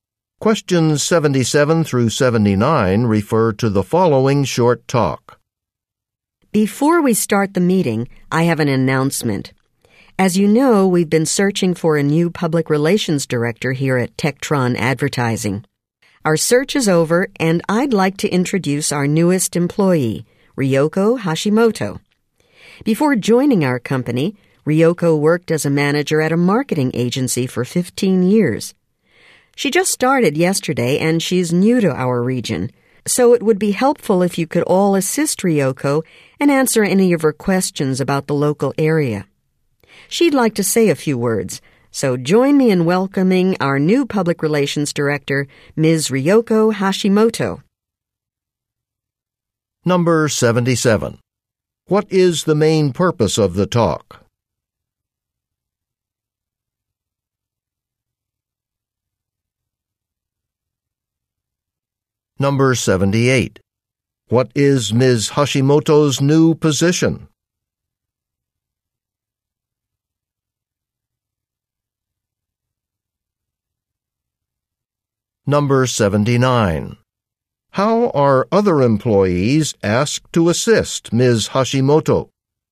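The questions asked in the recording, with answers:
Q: What is the main purpose of the talk?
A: To introduce a new employee

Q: What is Ms. Hashimoto's new position?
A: Public relations director

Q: How are other employees asked to assist Ms.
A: Answer her questions about the local area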